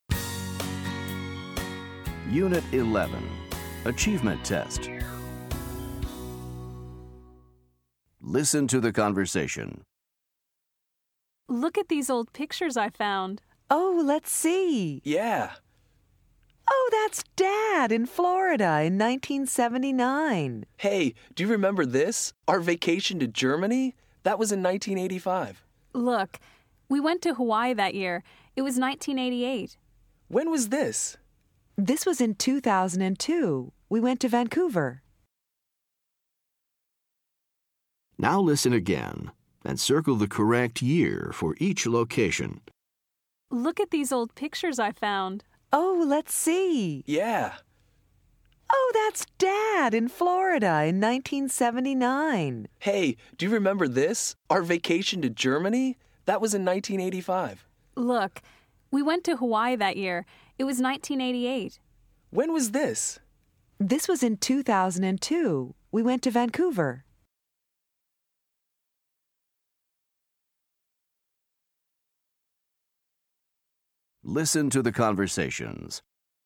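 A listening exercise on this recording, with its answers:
Listen to the conversation. Then listen again and choose the correct year for each location.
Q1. Germany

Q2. Hawaii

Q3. Vancouver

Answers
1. 1985
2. 1988
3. 2002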